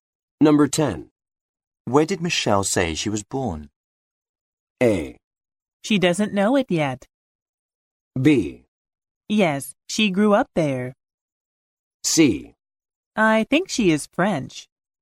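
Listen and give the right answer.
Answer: C: I think she is French.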